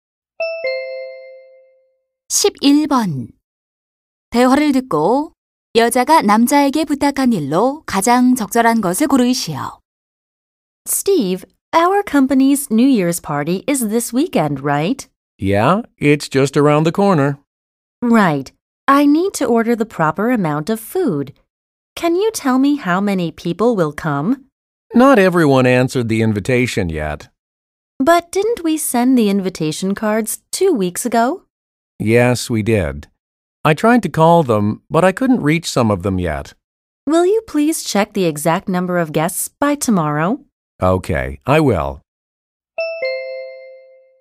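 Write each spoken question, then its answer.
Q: 대화를 듣고 여자가 남자에게 부탁한 일로 가장 적절한 것을 고르시오.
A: 내일까지 정확한 참석 인원 확인하기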